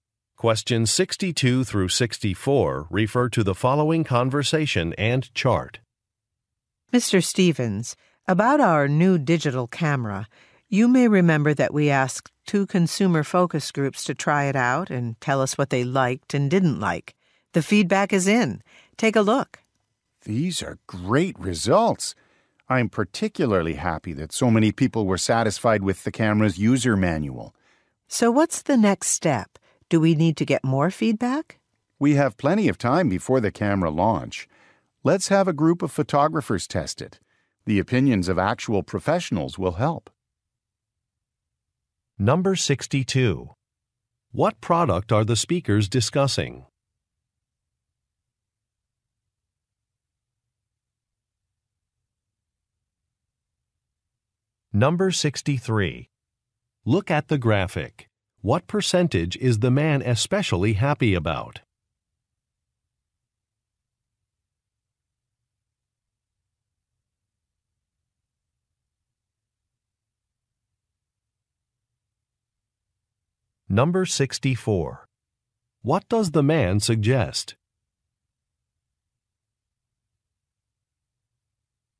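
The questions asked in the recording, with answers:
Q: What product are the speakers discussing?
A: A digital camera

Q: What does the man suggest?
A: Having professional photographers test it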